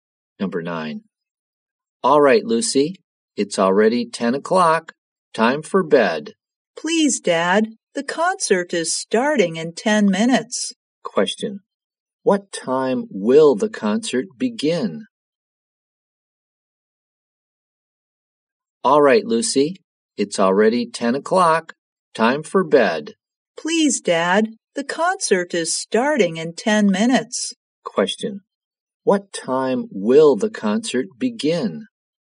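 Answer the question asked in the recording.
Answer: At 10:10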